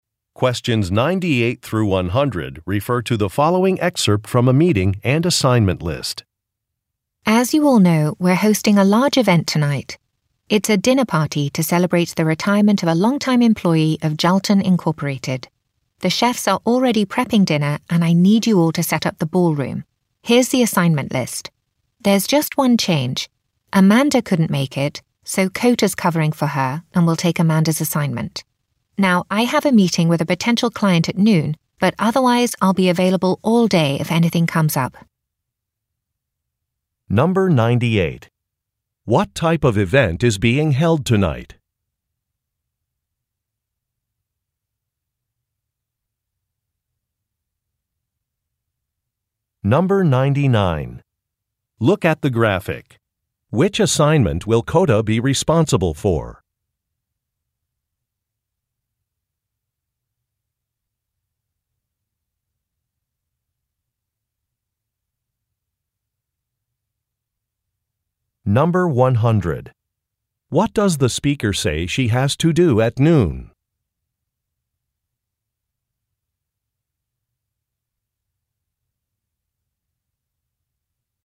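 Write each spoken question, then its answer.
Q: What type of event is being held tonight?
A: A retirement dinner party

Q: What does the speaker say she has to do at noon?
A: Meet with a potential client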